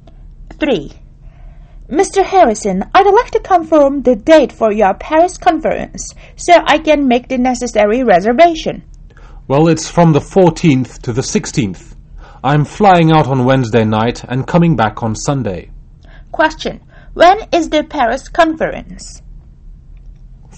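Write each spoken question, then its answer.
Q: When is the Paris conference?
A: From the 14th to the 16th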